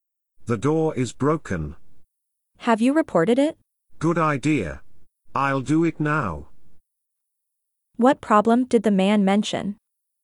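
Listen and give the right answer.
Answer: the door is broken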